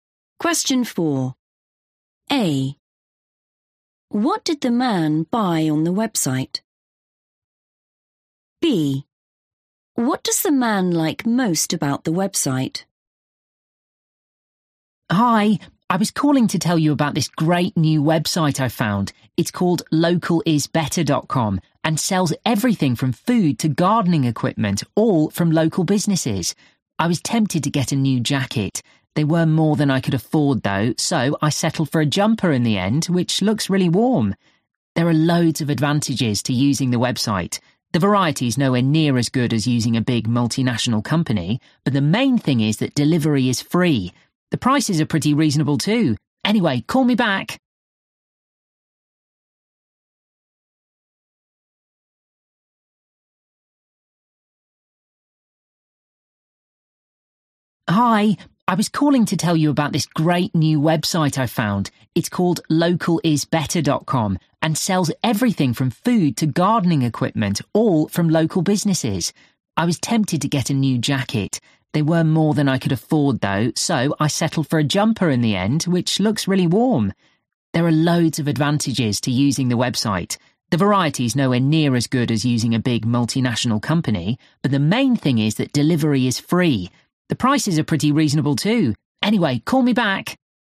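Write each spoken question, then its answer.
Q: What did the man buy on the website?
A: a jumper

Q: What does the man like most about the website?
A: free delivery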